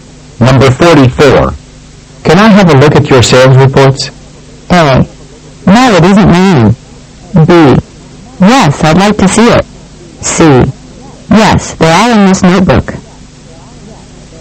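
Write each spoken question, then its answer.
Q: Can I have a look at your sales reports?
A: C: Yes, they're all in this notebook.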